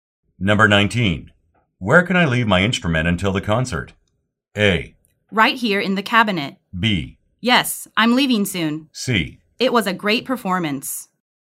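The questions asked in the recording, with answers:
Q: Where can I leave my instrument until the concert?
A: A: Right here in the cabinet.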